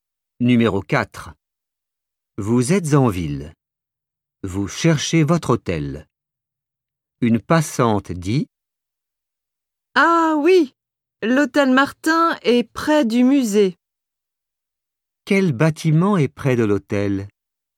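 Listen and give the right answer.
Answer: le musée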